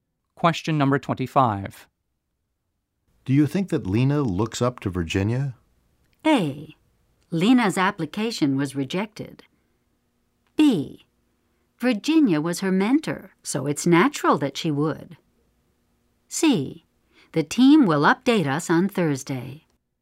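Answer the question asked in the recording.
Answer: B: Virginia was her mentor, so it's natural that she would.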